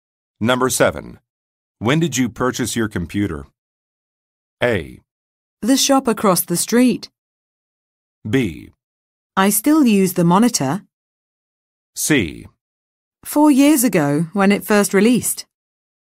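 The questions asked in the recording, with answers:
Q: When did you purchase your computer?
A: C: 4 years ago, when it first released.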